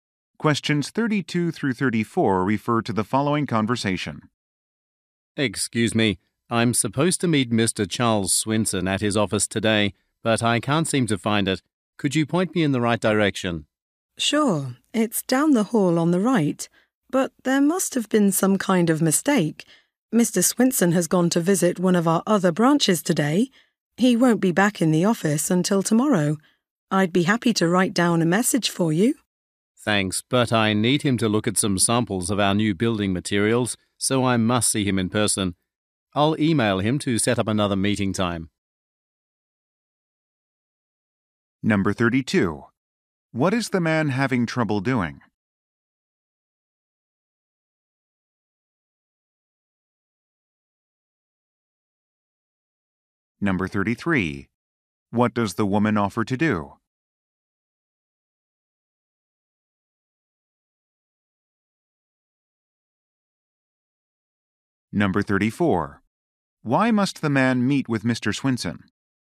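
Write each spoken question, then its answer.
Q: What is the man having trouble doing?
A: Finding Mr. Swinson's office

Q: What does the woman offer to do?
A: Write down a message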